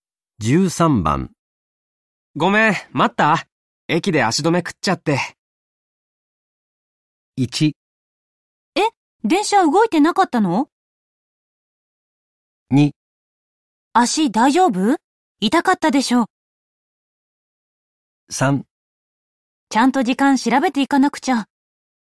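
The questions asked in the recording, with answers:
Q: ごめん、待った?駅で足止め食っちゃって。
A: 1: え、電車動いてなかったの?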